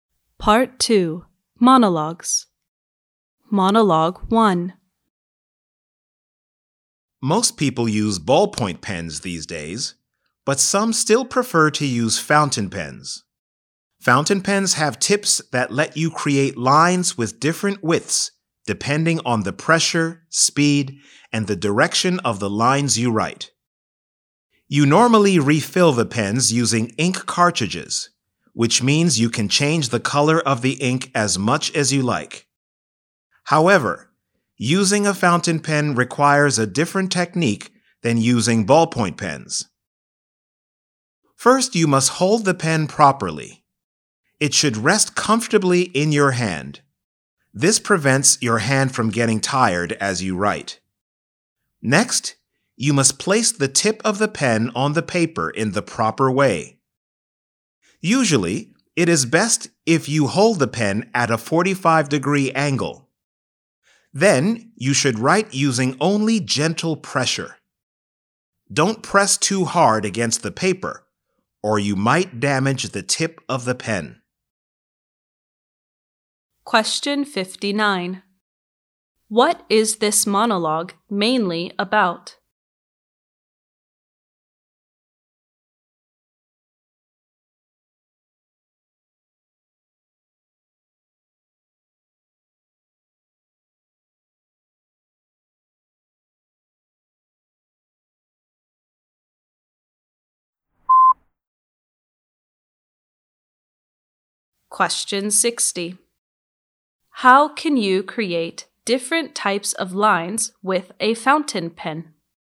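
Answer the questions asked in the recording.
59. Fountain pens and how to write with them
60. By changing the pressure, speed, and direction of the lines you write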